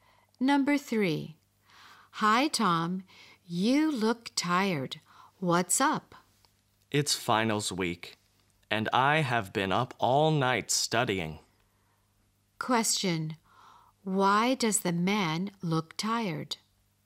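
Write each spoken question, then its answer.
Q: Why does the man look tired?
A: He has been up all night studying for finals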